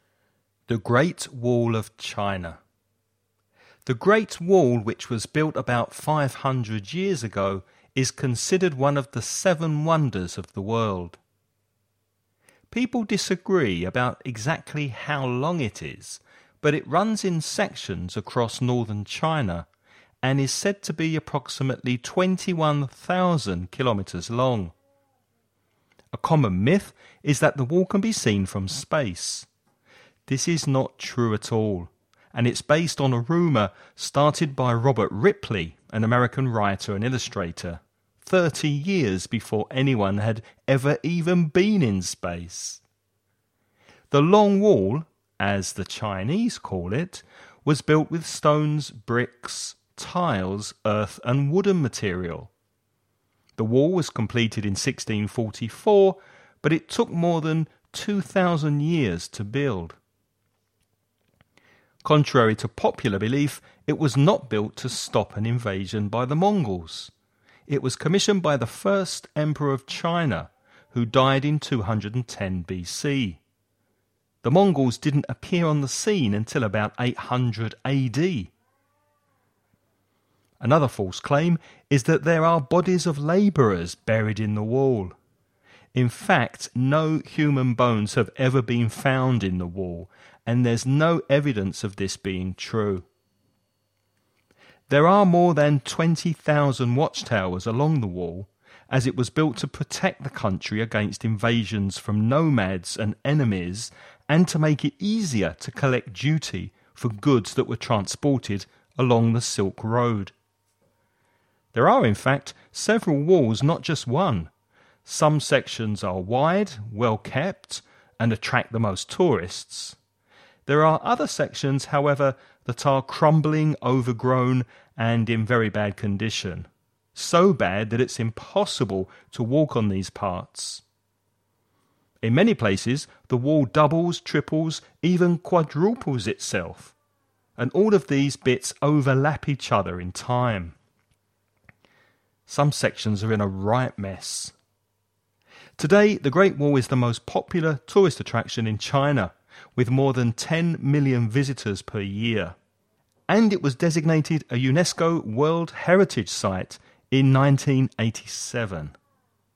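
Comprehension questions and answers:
Before you listen about a man talking about the Great Wall of China, read the following questions.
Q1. How long is the Wall?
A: Approximately 21,000 kilometres

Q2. Which materials is the Wall composed of?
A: Stones, bricks, tiles, earth and wooden material

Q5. How did the status of the wall change in 1987?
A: It was designated a UNESCO World Heritage Site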